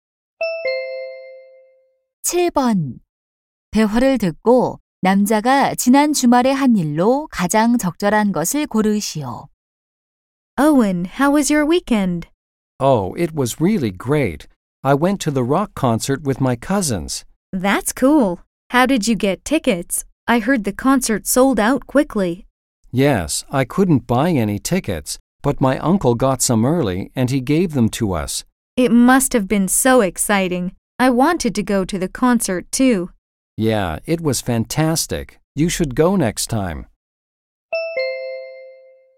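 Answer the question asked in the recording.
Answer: 록 콘서트 관람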